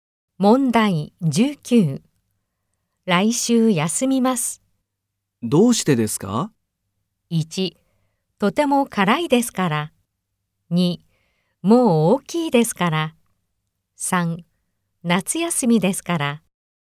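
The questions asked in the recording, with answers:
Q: 来週休みます。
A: 3: 夏休みですから。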